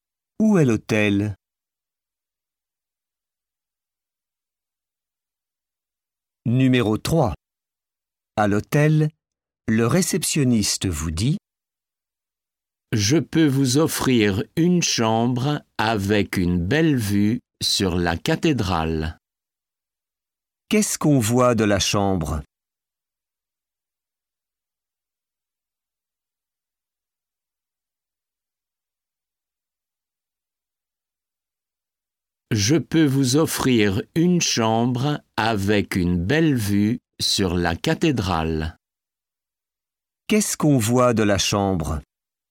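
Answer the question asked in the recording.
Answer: La cathédrale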